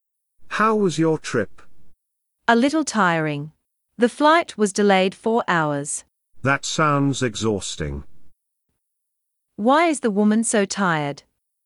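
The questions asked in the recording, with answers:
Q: Why is the woman so tired?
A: Her flight was delayed four hours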